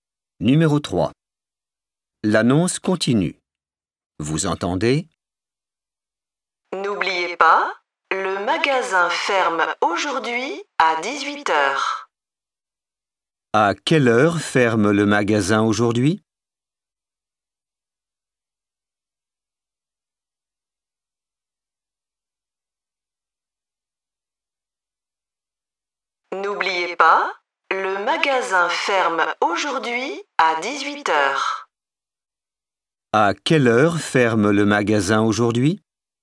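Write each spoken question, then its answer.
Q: À quelle heure ferme le magasin aujourd'hui?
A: à 18h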